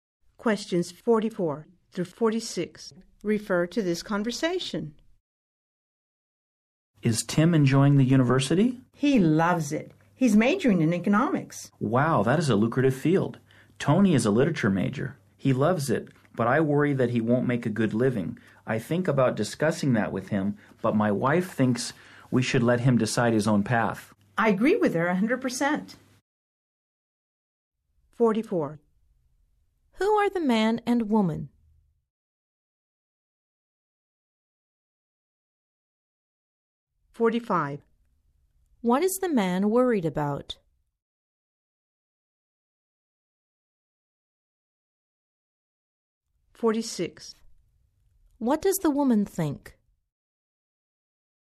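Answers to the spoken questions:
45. That Tony won't make a good living as a literature major
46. They should let Tony decide his own path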